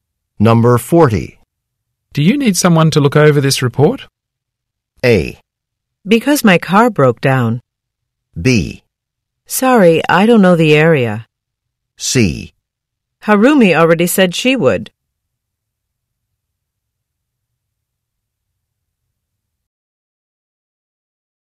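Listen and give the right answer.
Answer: C: Harumi already said she would.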